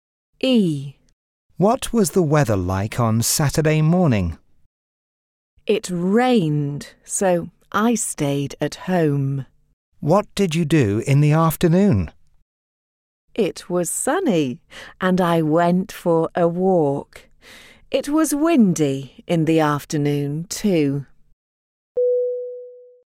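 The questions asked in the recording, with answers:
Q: What was the weather like on Saturday morning?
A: Rainy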